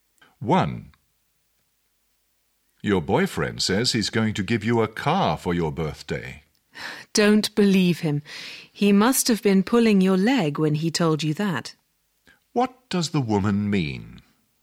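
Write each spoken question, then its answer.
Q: What does the woman mean?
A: The boyfriend was only joking about giving her a car.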